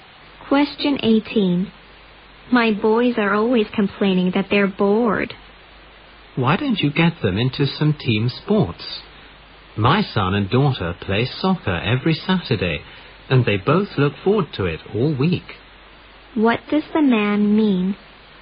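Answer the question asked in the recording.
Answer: The woman should get her boys into team sports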